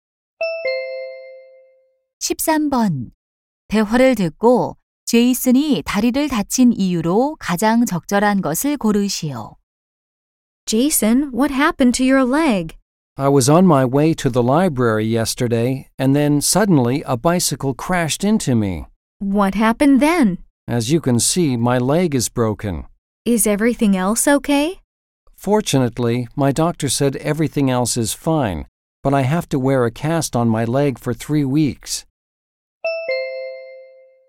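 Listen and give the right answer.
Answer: 자전거에 부딪혀서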